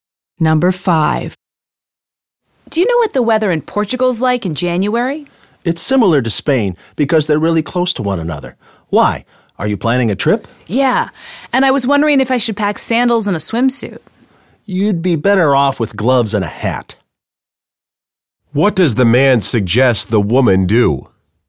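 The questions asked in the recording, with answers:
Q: What does the man suggest the woman do?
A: Pack warm clothes like gloves and a hat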